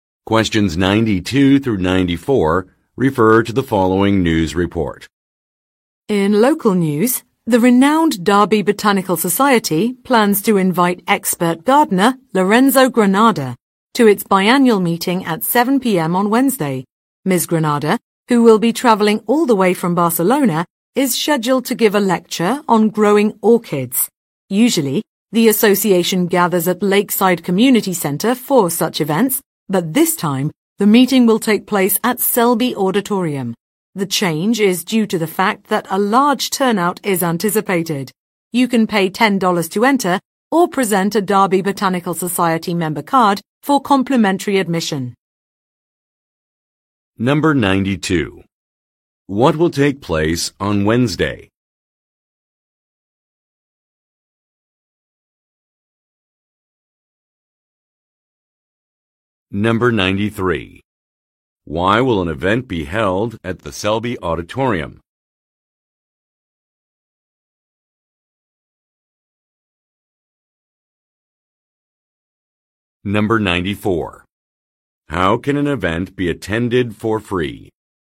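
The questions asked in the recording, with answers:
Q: What will take place on Wednesday?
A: A botanical society meeting with a lecture on growing orchids

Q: Why will an event be held at the Selby Auditorium?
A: A large turnout is expected

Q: How can an event be attended for free?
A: By showing a Derby Botanical Society member card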